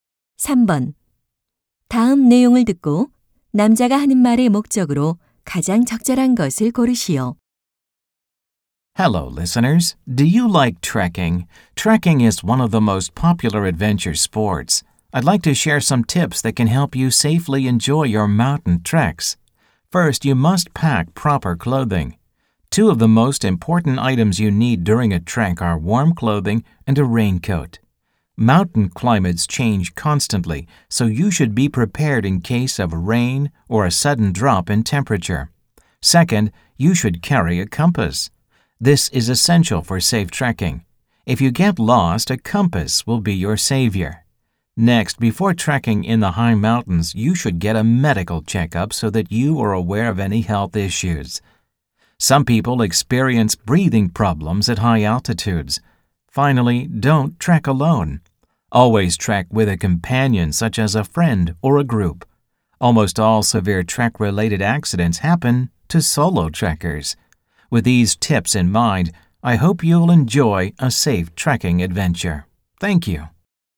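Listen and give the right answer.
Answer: 안전한 트레킹을 위한 조언을 제공하려고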